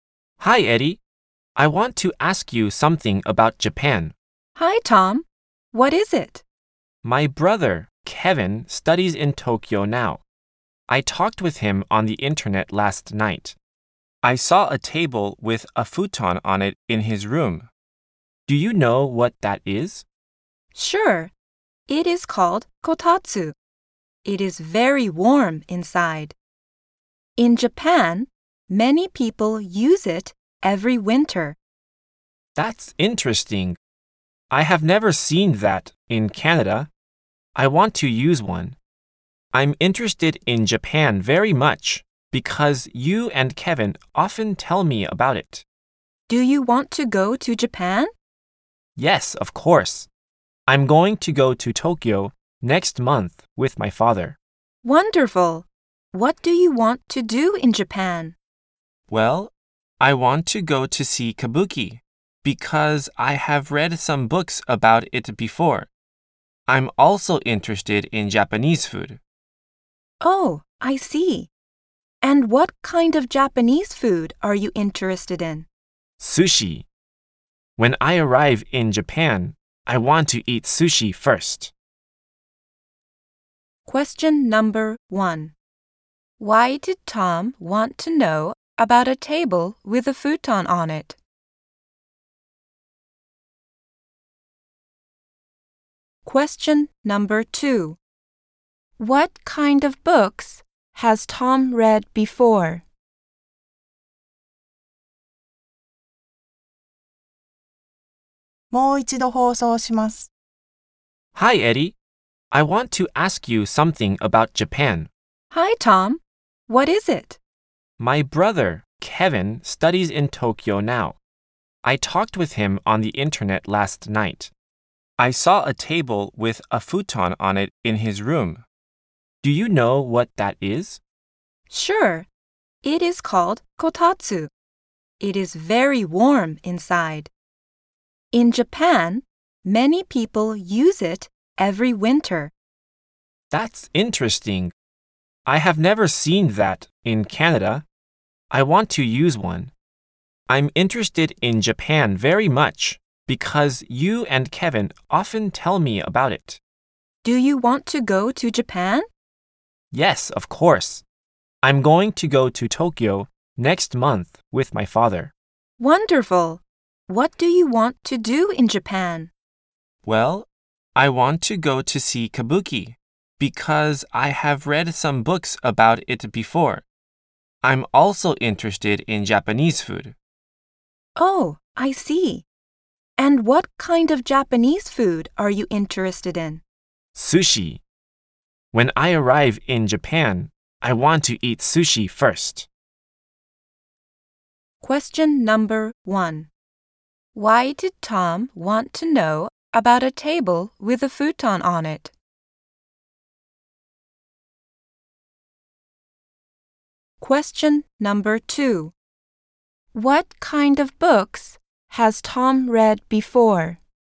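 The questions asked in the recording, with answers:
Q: Why did Tom want to know about a table with a futon on it?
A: Because he saw one in his brother Kevin's room when he talked with him on the internet.

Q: What kind of books has Tom read before?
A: Books about Kabuki.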